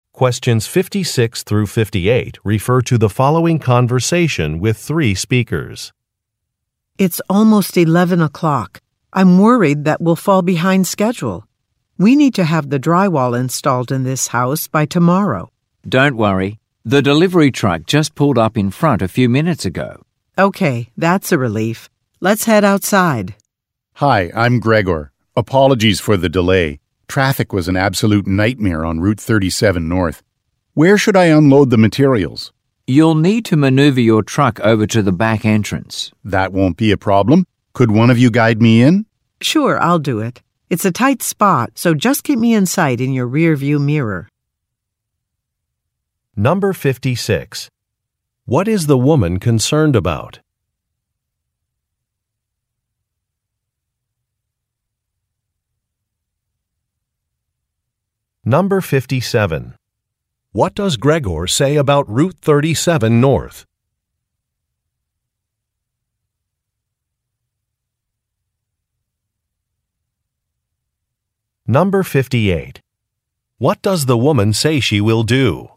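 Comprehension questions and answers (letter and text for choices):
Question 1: What is the woman concerned about?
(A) Having enough workers for a project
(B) Staying within budget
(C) Passing an inspection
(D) Completing work on time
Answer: (D) Completing work on time

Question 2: What does Gregor say about Route 37 North?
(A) Its toll prices have increased.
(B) It was closed for repairs.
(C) Traffic was really heavy.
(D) Oversized vehicles are not permitted.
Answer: (C) Traffic was really heavy.

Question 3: What does the woman say she will do?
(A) Sign an invoice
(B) Open a garage door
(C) Guide a truck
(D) Contact a homeowner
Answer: (C) Guide a truck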